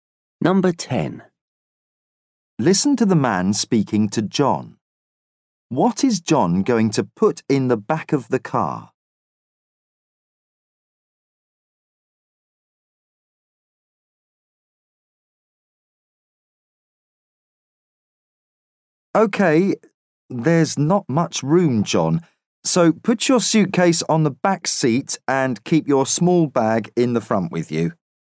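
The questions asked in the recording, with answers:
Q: What is John going to put in the back of the car?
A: His suitcase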